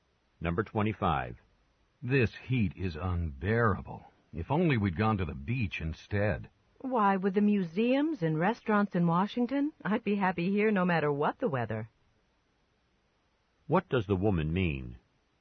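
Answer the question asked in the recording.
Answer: She is happy to be in Washington despite the heat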